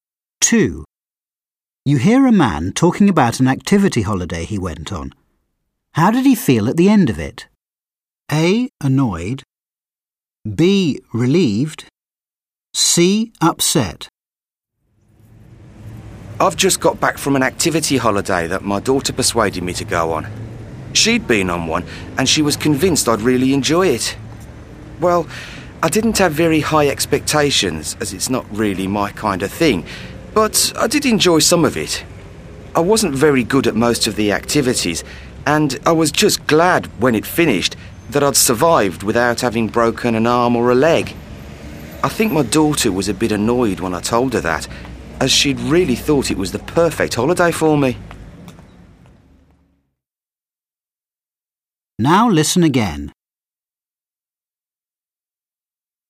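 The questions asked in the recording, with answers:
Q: How did he feel at the end of it?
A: B: Relieved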